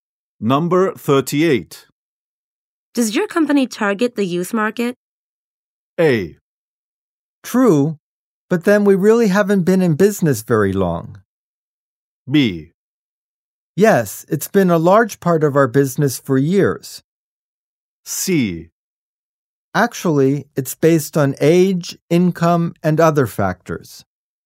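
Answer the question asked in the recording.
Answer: B: Yes, it's been a large part of our business for years.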